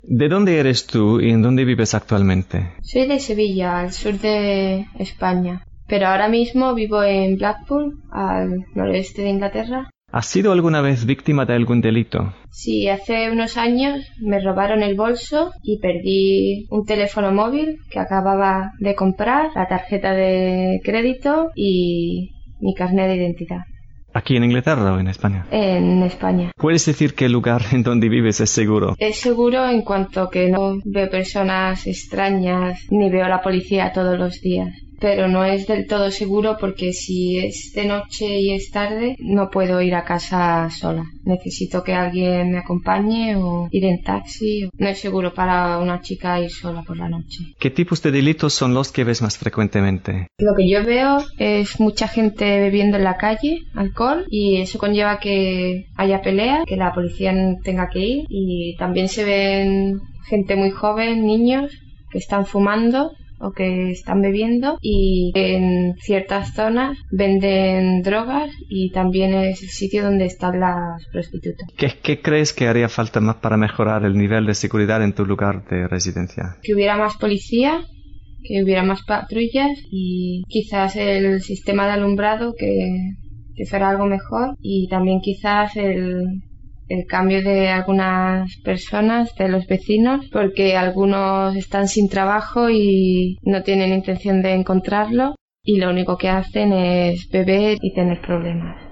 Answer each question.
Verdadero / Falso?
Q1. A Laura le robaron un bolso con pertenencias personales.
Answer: Verdadero

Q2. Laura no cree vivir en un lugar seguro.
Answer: Verdadero

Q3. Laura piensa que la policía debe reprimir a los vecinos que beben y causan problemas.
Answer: Falso

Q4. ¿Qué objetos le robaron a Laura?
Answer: El bolso, un teléfono móvil, su tarjeta de crédito y un carné de identidad.

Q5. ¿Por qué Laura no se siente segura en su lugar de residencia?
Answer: No, porque si sale por la noche debe ir acompañada por alguien.

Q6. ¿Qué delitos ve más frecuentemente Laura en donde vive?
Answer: Ve mucha gente bebiendo en la calle, hay peleas, hay niños bebiendo y fumando, se venden drogas y también hay prostitutas.

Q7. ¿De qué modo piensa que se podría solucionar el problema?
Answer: Con mayor policía y un mejor sistema de alumbrado y cambiando a algunos vecinos.

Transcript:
Graeme: ¿De dónde eres tú y en dónde vives actualmente?
Laura: Soy de Sevilla, al sur de España, pero ahora mismo vivo en Blackpool, al noroeste de Inglaterra. Graeme: ¿Has sido alguna vez víctima de algún delito?
Laura: Sí, hace unos años me robaron el bolso y perdí un teléfono móvil que acababa de comprar, la tarjeta de crédito y mi carné de identidad. Graeme: ¿En Inglaterra o en España?
Laura: En España. Graeme: ¿Puedes decir que el lugar en dónde vives es seguro?
Laura: Es seguro en cuanto a que no veo personas extrañas ni veo a la policía todos los días, pero no es del todo seguro porque si es de noche y es tarde no puedo ir a casa sola. Necesito que alguien me acompañe o ir en taxi...No es seguro para una chica ir sola por la noche. Graeme: ¿Qué tipos de delitos son los que ves más frecuentemente?
Laura: Lo que yo veo, es mucha gente bebiendo en la calle, alcohol, y eso conlleva que haya pelea, que la policía tenga que ir, y también se ven gente muy joven, niños, que están fumando o que están bebiendo y en ciertas zonas venden drogas y también es el sitio donde están las prostitutas. Graeme: ¿Qué crees que haría falta para mejorar el nivel de seguridad en tu lugar de residencia?
Laura: Que hubiera más policía, que hubiera más patrullas y quizás el sistema de alumbrado que se haga algo mejor y quizás el cambio de algunas personas de los vecinos porque algunos están sin trabajo y no tienen intención de encontrarlo y lo único que hacen es beber y tener problemas.

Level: Advanced